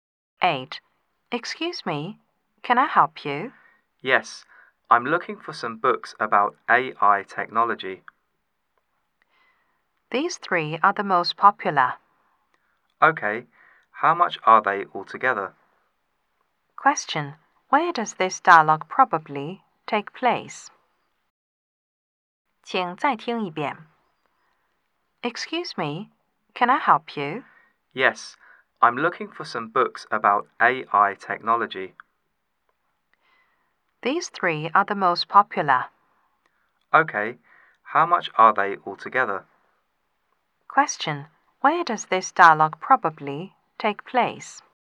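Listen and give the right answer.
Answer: In a bookstore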